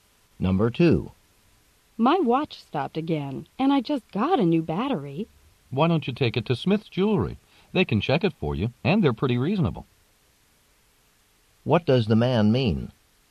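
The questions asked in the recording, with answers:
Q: What does the man mean?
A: The woman should take her watch to Smith's Jewelry to have it checked.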